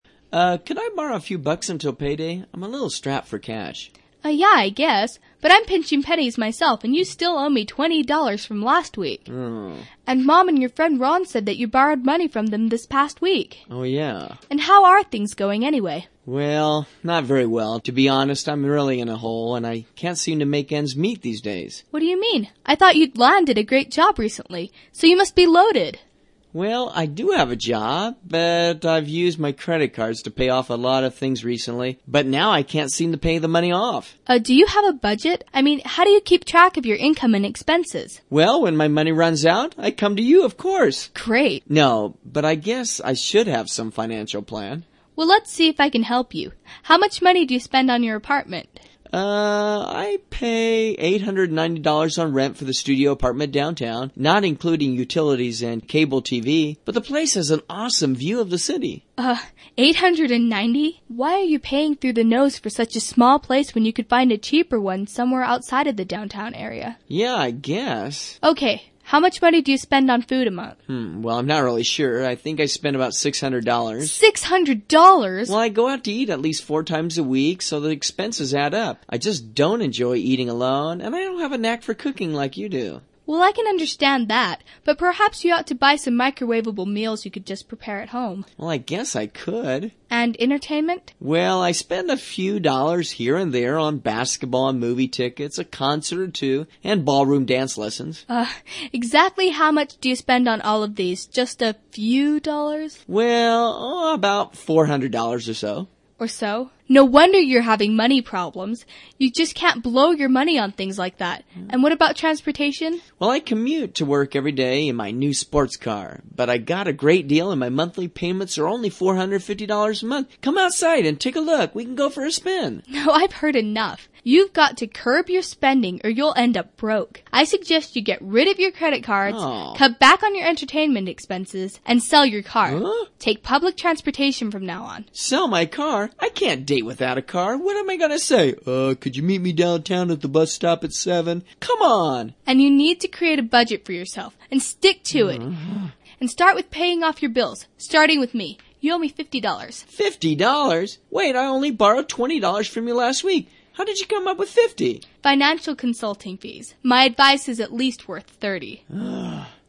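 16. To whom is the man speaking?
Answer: his sister

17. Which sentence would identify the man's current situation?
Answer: He's in debt and is trying to borrow money.

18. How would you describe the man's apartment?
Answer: a small place with a nice view of the city

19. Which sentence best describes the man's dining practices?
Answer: He doesn't know how to cook very well.

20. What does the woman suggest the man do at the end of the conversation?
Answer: He ought to get rid of his car to save money.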